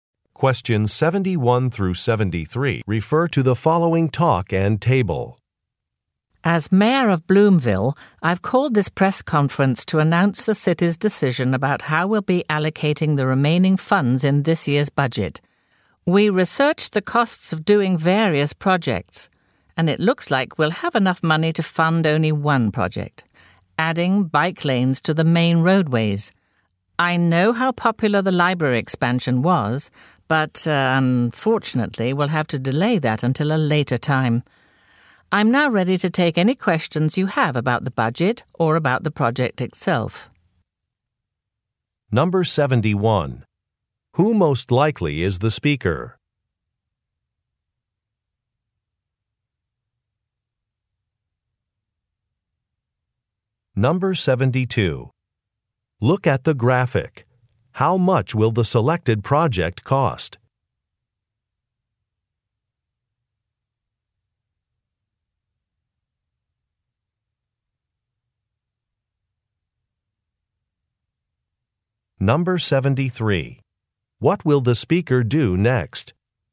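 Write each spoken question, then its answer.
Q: Who most likely is the speaker?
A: The mayor of Bloomville

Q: What will the speaker do next?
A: Answer questions about the budget or the project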